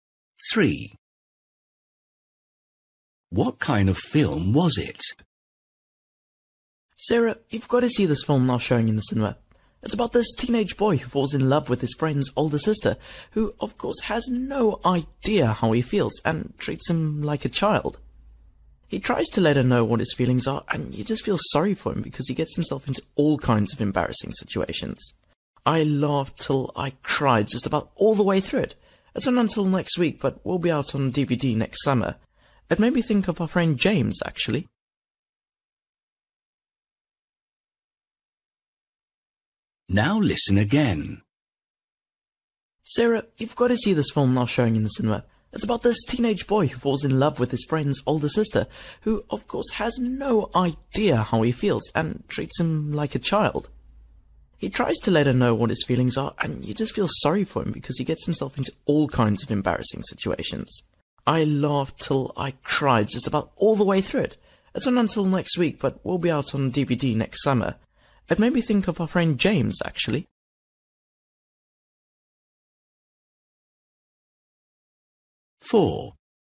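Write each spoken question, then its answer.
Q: What kind of film was it?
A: A comedy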